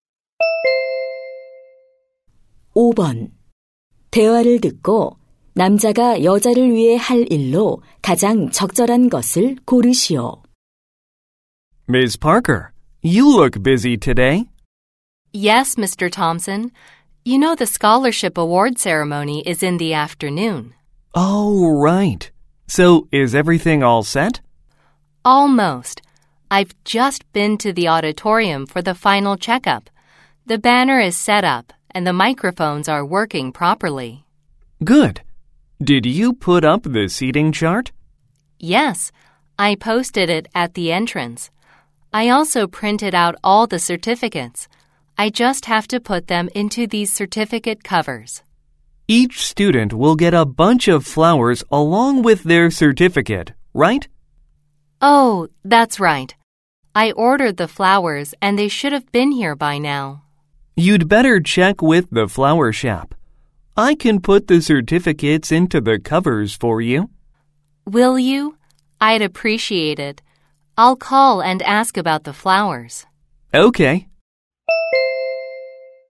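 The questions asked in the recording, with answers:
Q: 대화를 듣고 남자가 여자를 위해 할 일로 가장 적절한 것을 고르시오.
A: 수료증을 커버에 넣기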